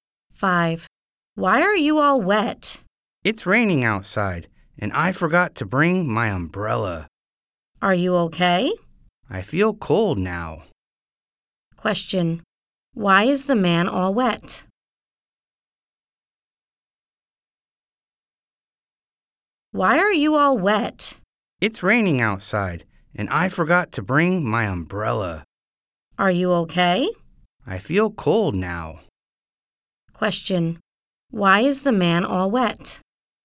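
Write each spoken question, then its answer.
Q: Why is the man all wet?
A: It's raining and he forgot his umbrella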